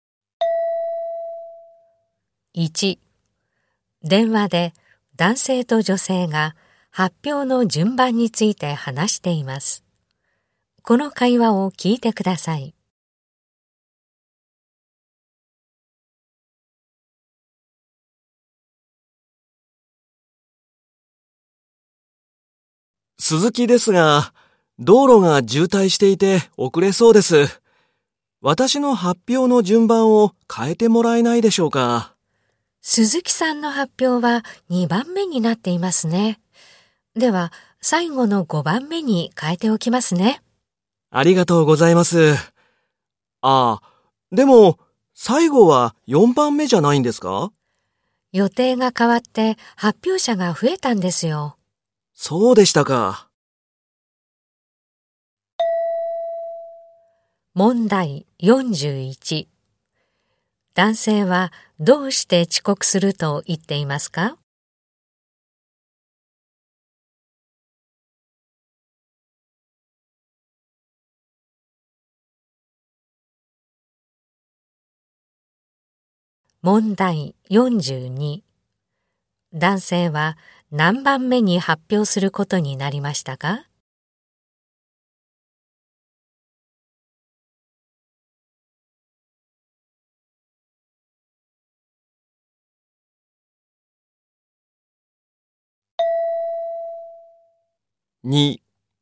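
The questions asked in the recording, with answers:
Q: 男性はどうして遅刻すると言っていますか?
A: 道路が渋滞しているから

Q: 男性は何番目に発表することになりましたか?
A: 5番目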